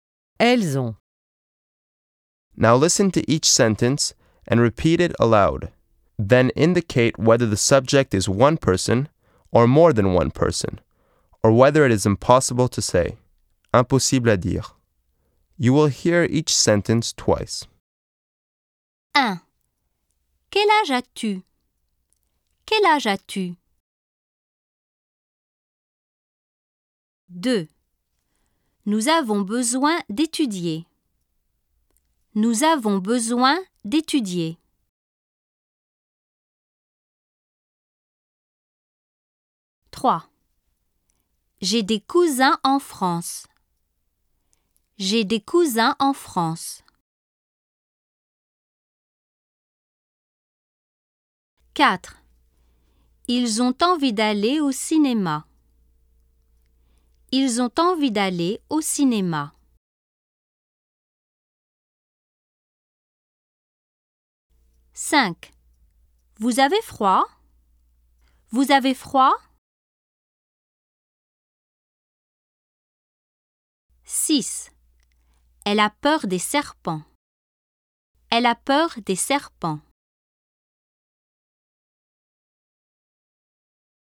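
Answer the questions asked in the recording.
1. one person
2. more than one person
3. one person
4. more than one person
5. impossible à dire
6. one person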